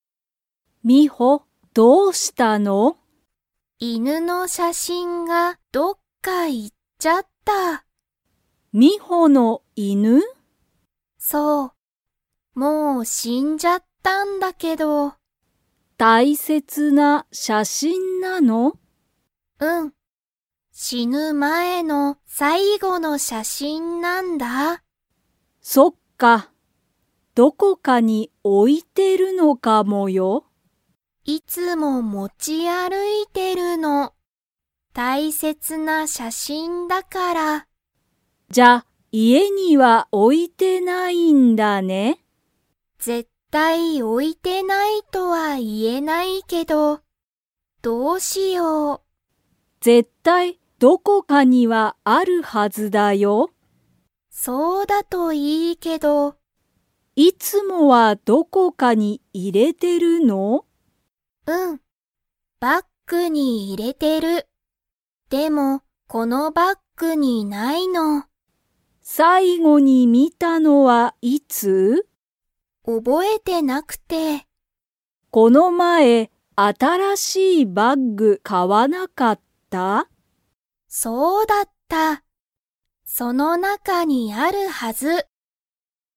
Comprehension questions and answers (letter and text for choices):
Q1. その写真(しゃしん)は、犬(いぬ)が死(し)ぬ前(まえ)の____写真(しゃしん)だ。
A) 絶対(ぜったい)の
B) 新(あたら)しい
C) いつもの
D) 最後(さいご)の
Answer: D) 最後(さいご)の

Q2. ミホは犬(いぬ)の写真(しゃしん)を、いつも家(いえ)に置(お)いていますか?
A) はい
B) いいえ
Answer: B) いいえ

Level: Level 2